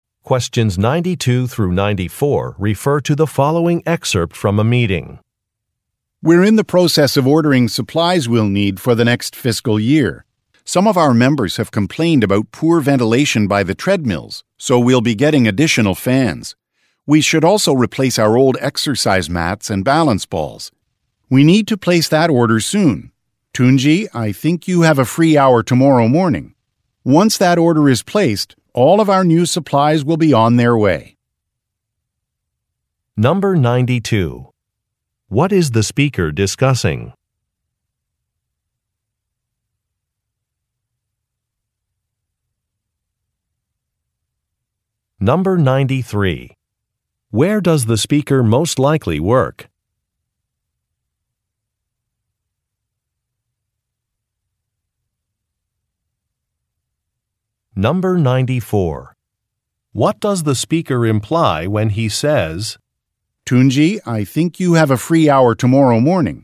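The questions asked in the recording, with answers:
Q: What is the speaker discussing?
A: Ordering supplies for the next fiscal year

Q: Where does the speaker most likely work?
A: At a fitness center (gym)

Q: What does the speaker imply when he says,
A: He wants Tunji to place the supply order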